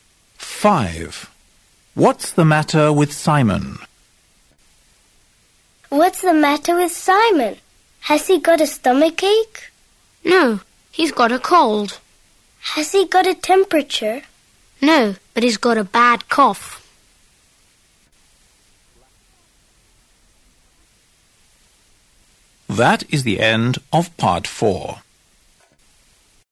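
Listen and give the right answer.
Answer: He's got a cold and a bad cough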